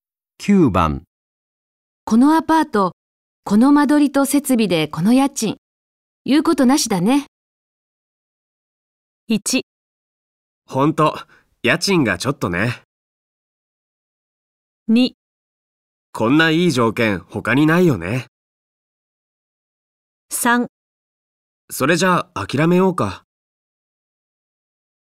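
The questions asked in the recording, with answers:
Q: このアパート、この間取りと設備でこの家賃、言うことなしだね。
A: 2: こんないい条件、他にないよね。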